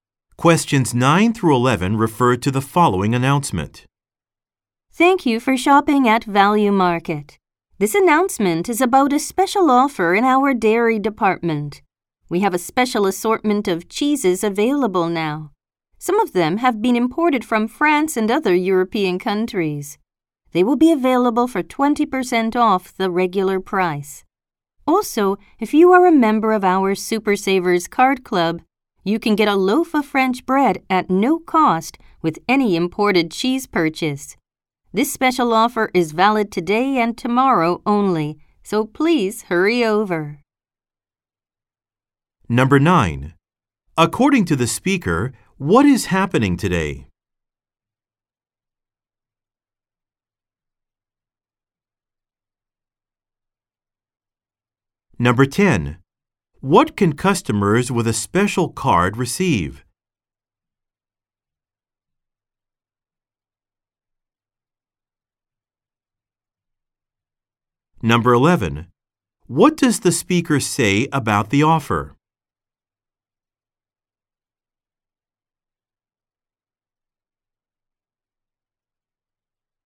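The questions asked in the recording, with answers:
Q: According to the speaker, what is happening today?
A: A special sale on cheeses (20% off)

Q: What can customers with a special card receive?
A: A free loaf of French bread with an imported cheese purchase

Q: What does the speaker say about the offer?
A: It is valid today and tomorrow only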